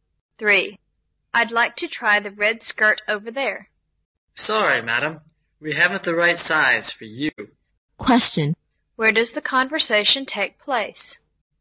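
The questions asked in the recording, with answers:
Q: Where does the conversation take place?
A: In a clothing shop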